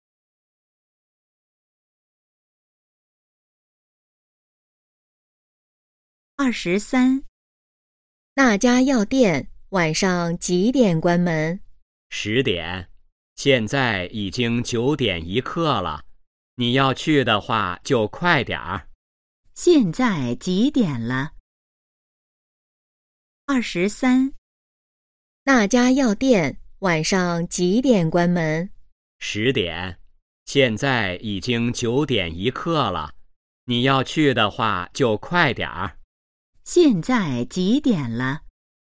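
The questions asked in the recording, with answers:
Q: 现在几点了?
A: 九点一刻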